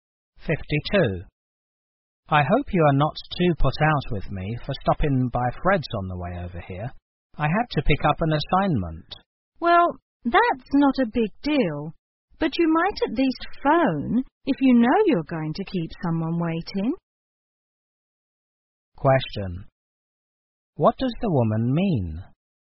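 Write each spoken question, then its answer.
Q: What does the woman mean?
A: The man should have phoned to say he would be late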